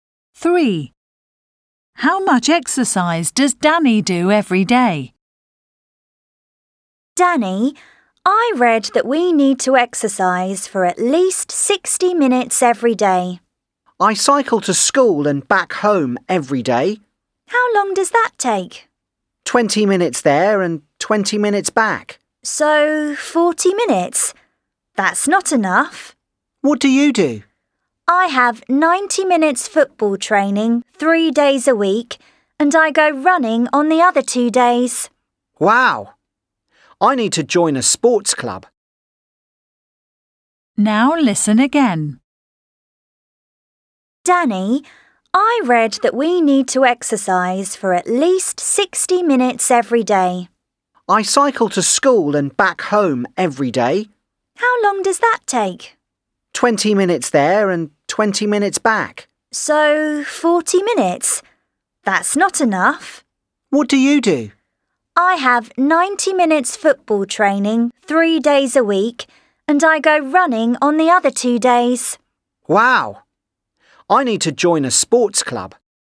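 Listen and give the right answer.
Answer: 40 minutes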